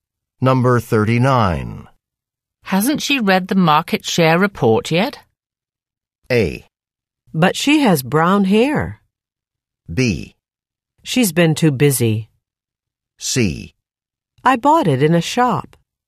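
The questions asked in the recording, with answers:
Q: Hasn't she read the market share report yet?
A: B: She's been too busy.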